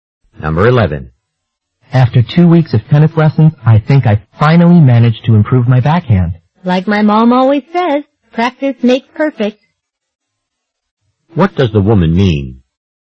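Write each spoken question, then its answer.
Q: What does the woman mean?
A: The man's practice helped him improve.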